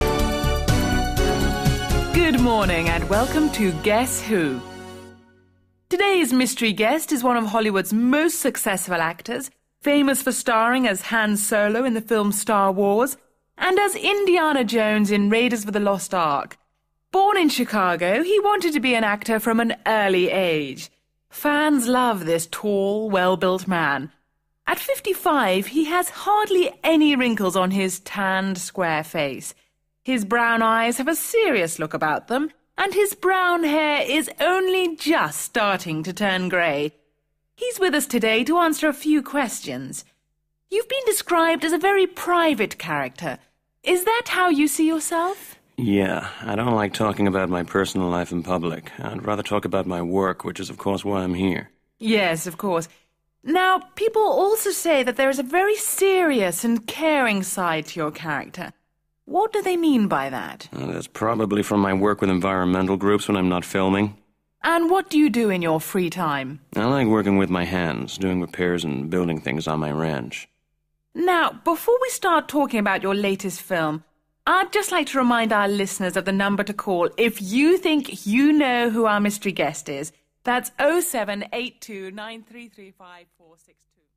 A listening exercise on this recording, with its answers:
3. Read the table, then listen and fill in the missing words.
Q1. S.......... W......, Raiders of the Lost Ark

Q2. t.........., well-built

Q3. tanned s.......... face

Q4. b.......... eyes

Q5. brown hair starting to turn g..........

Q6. private, s.........., caring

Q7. works with environmental g..........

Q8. likes w.......... with his hands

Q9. b.......... things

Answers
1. Star Wars
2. tall
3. square
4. brown
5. grey
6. serious
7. groups
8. working
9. building

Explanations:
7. Ah, that's probably from my work with environmental groups when I'm not filming.

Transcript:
Presenter: Good morning and welcome to 'Guess Who?' Today's mystery guest is one of Hollywood's most successful actors, famous for starring as Han Solo in the film Star Wars, and as Indiana Jones in Raiders of the Lost Ark. Born in Chicago, he wanted to be an actor from an early age. Fans love this tall, well-built man. At 55 he has hardly any wrinkles on his tanned, square face. His brown eyes have a serious look about them and his brown hair is only just starting to turn grey. He's with us today to answer a few questions. You've been described as a very private character. Is that how you see yourself?
Harrison Ford: Yeah, I don't like talking about my personal life in public. I'd rather talk about my work which is, of course, why I'm here.
Presenter: Yes, of course. Now, people also say that there is a very serious and caring side to your character – what do they mean by that?
Harrison Ford: Ah, that's probably from my work with environmental groups when I'm not filming.
Presenter: And, what do you do in your free time?
Harrison Ford: I like working with my hands – doing repairs and building things on my ranch.
Presenter: Now, before we start talking about your latest film, I'd just like to remind our listeners of the number to call if you think you know who our mystery guest is – that's 0782 ...